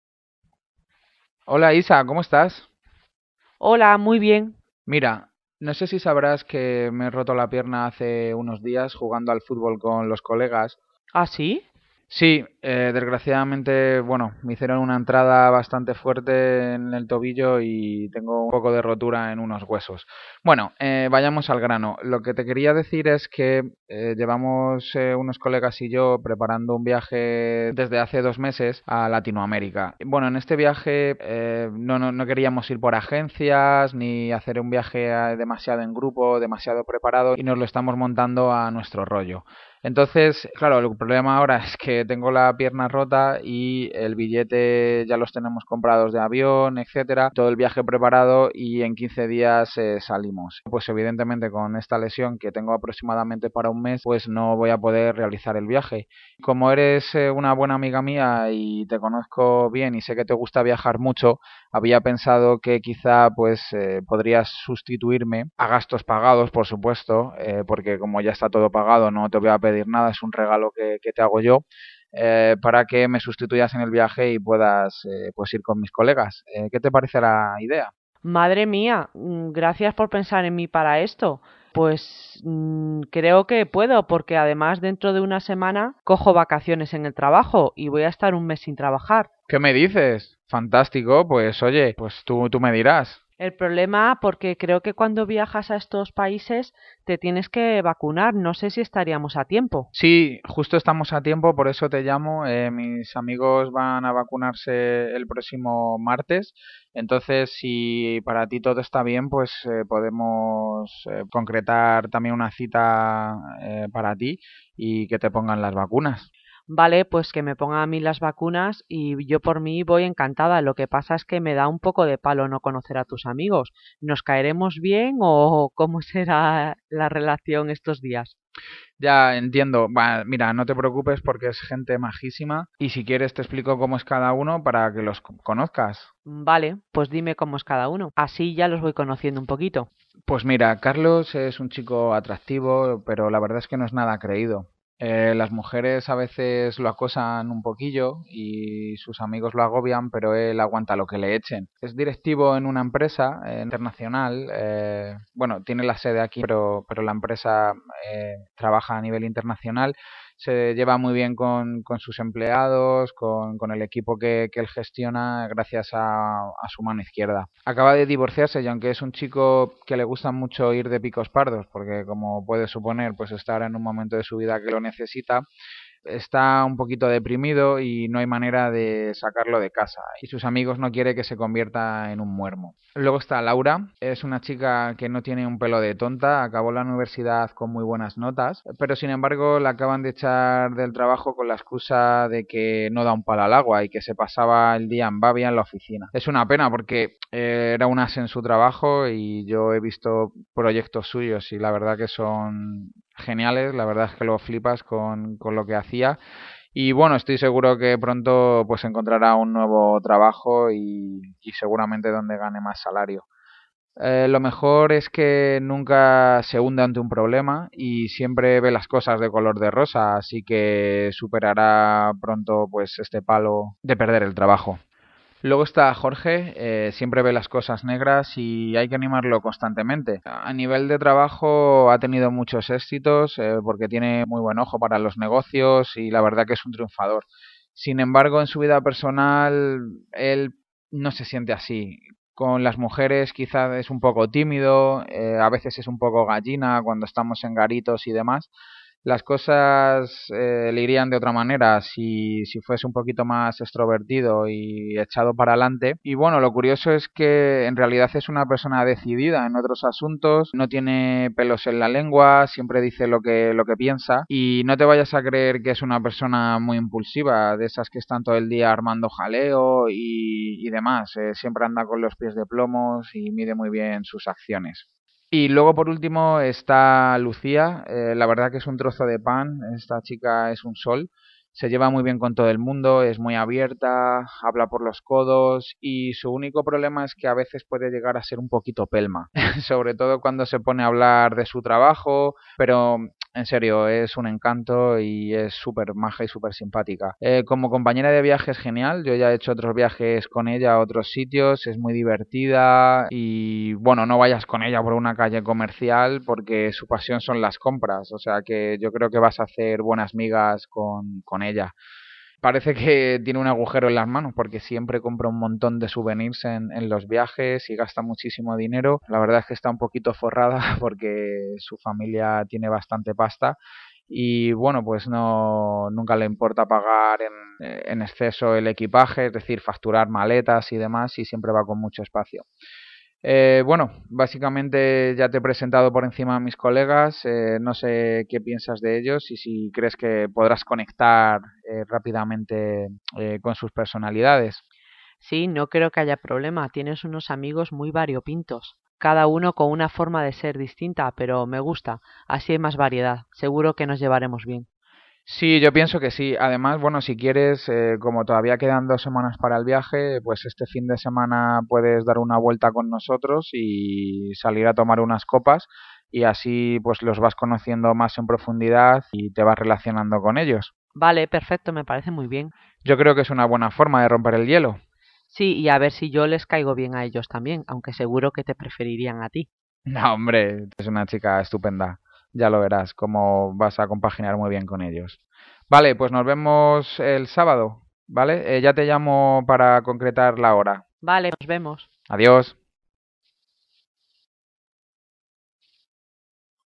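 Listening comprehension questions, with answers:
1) ¿Cuál es la mejor descripción para Carlos?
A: Gestiona bien, puede con todo, le gusta salir.

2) ¿Cuál es la mejor descripción para Laura?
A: Es inteligente, trabaja muy bien, siempre esta positivo/a.

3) ¿Cuál es la mejor descripción para Jorge?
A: Es cuidadoso/a, crítico/a, exitoso/a y un poco cobarde.

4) ¿Cuál es la mejor descripción para Lucia?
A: Buena persona, algo pesado/a y con bastante dinero.

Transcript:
Moisés: Hola Isa, ¿cómo estás?
Isabel: Holaaa ¡Muy bien!
Moisés: Mira, no sé si sabrás que me he roto la pierna hace unos días jugando al fútbol con los colegas.
Moisés: Sí, desgraciadamente, bueno, me hicieron una entrada fuerte en el tobillo y tengo un poco de rotura en unos huesos. Bueno, vayamos al grano. Lo que te quería decir es que llevamos, unos colegas y yo, preparando un viaje desde hace dos meses a Latinoamérica. 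Bueno, en este viaje, no queríamos ir por agencias, ni hacer un viaje demasiado en grupo, demasiado preparado, y nos lo estamos montando a nuestro rollo. Entonces, claro, el problema ahora es que tengo la pierna rota y el billete... ya los tenemos comprado, de avión, etc. todo el viaje preparado. Y en 15 días salimos. Pues evidentemente con esta lesión, que tengo aproximadamente para un mes, pues no voy a poder realizar el viaje. Como eres una buena amiga y te conozco bien y sé que te gusta viajar mucho. Había pensado que quizá, pues podrías sustituirme, a gastos pagados, por supuesto, porque como ya está todo pagado no te voy a pedir nada, es un regalo que te hago yo. Para que me sustituyas en el viaje y puedas ir con mis colegas..
Gracias por pensar en mí para esto. Pues creo que puedo, porque además dentro de una semana cojo vacaciones en el trabajo y voy a estar 1 mes sin trabajar.
Moisés: ¡Qué me dices! 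Fantástico. Pues oye, pues tu me dirás.
Isabel: El problema, porque creo que cuando viajas a estos países te tienes que vacunar, no sé si estaríamos a tiempo.
Moisés: sí, justo estamos a tiempo. Por eso te llamo. Mis amigos van a vacunarse el próximo martes. Entonces, si para ti todo está bien podemos concretar también una cita para ti y que te pongan las vacunas.
Isabel: Vale, pues que me pongan a mí las vacunas y yo por mí voy encantada. Lo que pasa que me da un poco de palo no conocer a tus amigos. ¿Nos caeremos bien o cómo será la relación estos días?
Moisés: Ya... entiendo. Buah, mira, no te preocupes porque es gente majísima. Y si quieres te explico cómo es cada uno para que los conozcas.
Isabel: Vale, pues dime cómo cada uno así ya los voy conociendo un poquito.
Moisés: Pues mira. Carlos es un chico atractivo pero la verdad es que no es nada creído. Las mujeres a veces lo acosan un poquillo y sus amigos lo agobian, pero él aguanta lo que le echen. 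Es directivo en una empresa internacional, bueno tiene la sede aquí pero la empresa trabaja a nivel internacional, se lleva muy bien con sus empleados, con el equipo que él gestiona, gracias a su mano izquierda. Acaba de divorciarse y aunque es un chico al que le gusta mucho ir de picos pardos porque como puedes suponer está ahora mismo en un momento de su vida que lo necesita, es está un poco deprimido y no hay manera de sacarlo de casa. Y sus amigos no quieren que se convierta en un muermo.
Luego está Laura, es una chica que no tiene un pelo de tonta, acabó la universidad con muy buenas notas, pero sin embargo la acaban de echar del trabajo con la excusa de que no da palo al agua y con la excusa de que se pasaba el día en Babia en la oficina.
Es una pena porque era un as en su trabajo y yo he visto proyectos suyos y la verdad que son geniales, la verdad es que lo flipas con lo que hacía. 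Y bueno, estoy seguro de que pronto encontrará un nuevo trabajo y seguramente donde gane más salario. Lo mejor es que nunca se hunde ante un problema, siempre ve las cosas de color de rosa, así que superará pronto, pues este palo de perder el trabajo.
Luego está Jorge siempre ve las cosas negras y hay que animarlo constantemente. a nivel de trabajo ha tenido muchos éxitos, porque tiene muy buen ojo para los negocios, y la verdad es que es un triunfador. Sin embargo, en su vida personal, no se siente así. Con las mujeres, quizá es un poco tímido, a veces es un poco gallina cuando estamos en garitos y demás, Las cosas le irían de otra manera si fuera un poquito más extrovertido y echado para adelante. Y bueno, lo curioso es que es una persona decidida para otros asuntos, no tiene pelos en la lengua, siempre dice lo que piensa. Y no te vayas a creer que es una persona muy impulsiva de esas que están todo el día armando jaleo y demás. 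Siempre anda con pies de plomo y mide muy bien sus acciones.
Y luego por último está Lucia, la verdad que es un trozo de pan, esta chica es un sol. Se lleva bien con todo el mundo. Es muy abierta y habla por los codos. Y su único problema es que a veces puede llegar a ser un poquito pelma, sobre todo cuando se pone a hablar de su trabajo. Pero... en serio, es un encanto y es super maja y super simpática. Como compañera de viaje es genial, yo ya he hecho otro viajes con ella a otros sitios. Es muy divertida y bueno no vayas con ella por una calle comercial, porque su pasión son las compras. O sea yo creo que vas hacer buenas migas con ella. Parece que tiene un agujero en las manos, porque siempre compra un montón de souvenirs en los viajes y gasta muchísimo dinero. La verdad es que está un poquito forrada, porque su familia tiene bastante pasta, y bueno pues, nunca le importa pagar el exceso de equipaje; es decir facturar maletas y demás, y siempre va con mucho espacio.
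Bueno, básicamente ya te he presentado por encima a mis colegas, no sé qué piensas de ellos y si crees que podrás conectar rápidamente con sus personalidades.
Isabel: Sí no creo que haya problemas, tiene unos amigos muy variopintos. Cada uno con una forma de ser distinta. Pero me gusta así hay más variedad, seguro que nos llevaremos bien.
Moisés: Sí, yo pienso que sí. Además, bueno, si quieres como todavía quedan dos semanas para el viaje pues este fin de semana puedes dar una vuelta con nosotros y salir a tomar unas copas y así, pues, los vas conociendo más en profundidad y te vas relacionando con ellos.
Isabel: Vale, perfecto, me parece muy bien.
Moisés: Yo creo que es una buena forma de romper el hielo
Isabel: Sí. Y a ver si yo les caigo bien a ellos también. Aunque seguro que te preferirían a ti.
Moisés: No hombre, si tu eres una chica estupenda. Ya lo verás, como vas a compaginar muy bien con ellos. 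¡Vale! pues nos vemos el sábado ¿Vale? Ya te llamo para concretar la hora.
Isabel: Vale, nos vemos.
Moisés: ¡Adiós!

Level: C1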